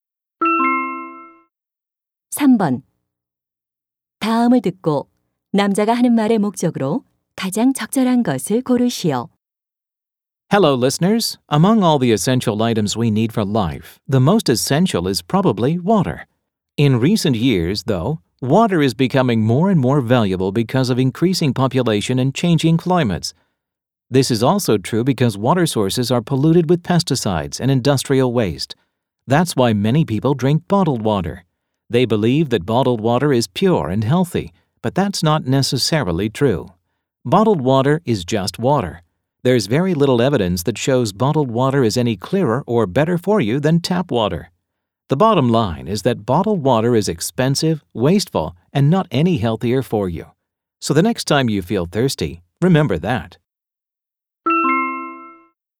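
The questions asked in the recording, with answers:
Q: 다음을 듣고 남자가 하는 말의 목적으로 가장 적절한 것을 고르시오.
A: 생수가 수돗물보다 낫지 않으니 생수를 사 마시지 말라고 권하려고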